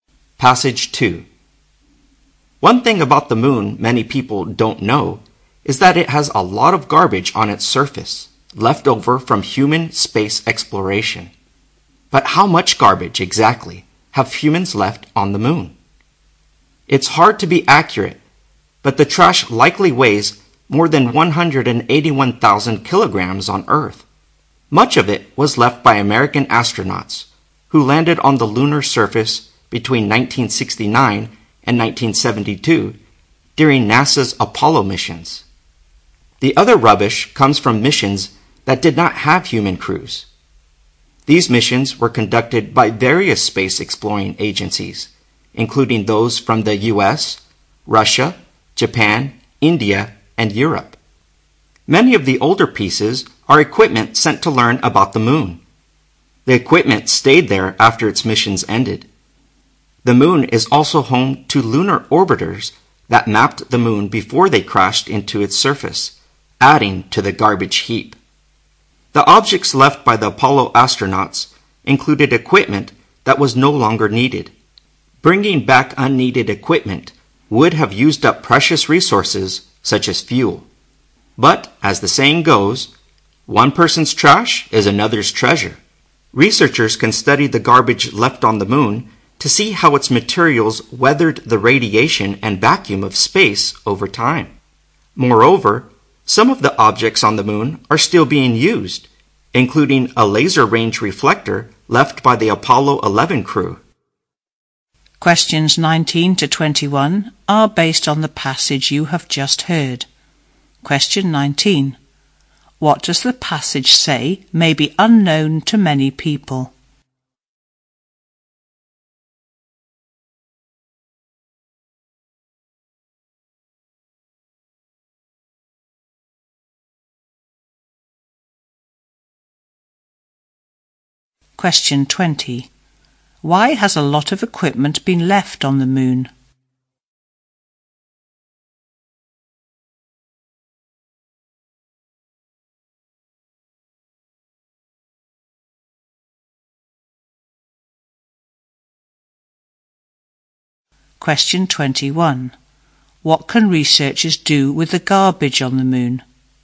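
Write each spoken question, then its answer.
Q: What does the passage say may be unknown to many people?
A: There is a lot of garbage on the moon's surface.

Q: Why has a lot of equipment been left on the moon?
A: Bringing back unneeded equipment would have used up precious resources such as fuel.

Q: What can researchers do with the garbage on the moon?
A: Study how its materials withstood radiation and the vacuum of space over time.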